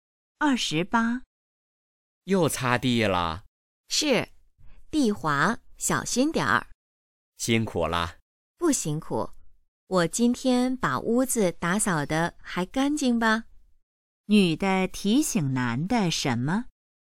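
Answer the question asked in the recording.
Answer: 地滑,小心点儿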